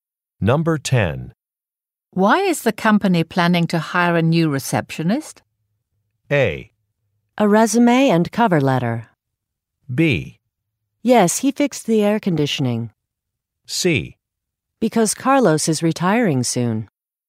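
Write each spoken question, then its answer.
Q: Why is the company planning to hire a new receptionist?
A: C: Because Carlos is retiring soon.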